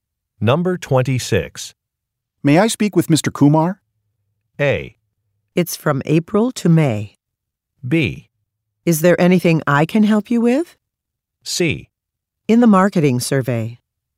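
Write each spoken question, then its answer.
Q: May I speak with Mr. Kumar?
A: B: Is there anything I can help you with?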